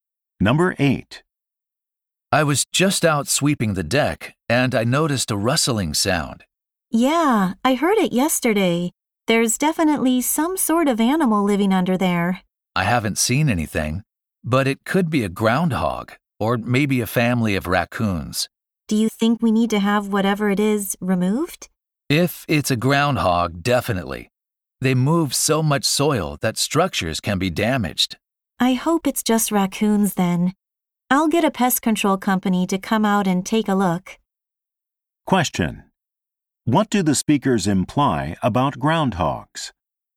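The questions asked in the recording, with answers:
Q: What do the speakers imply about groundhogs?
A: They can damage structures by moving soil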